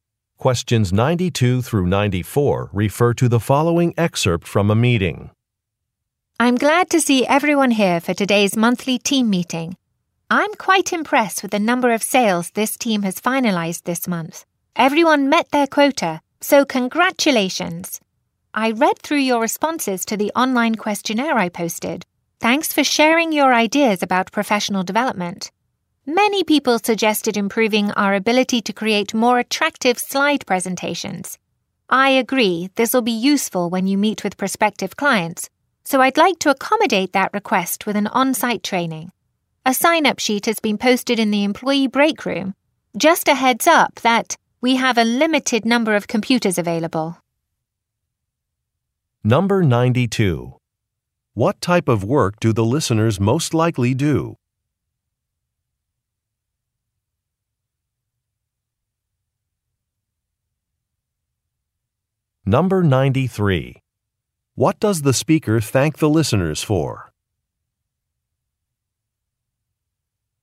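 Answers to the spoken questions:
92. Sales
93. Sharing their ideas on professional development in the questionnaire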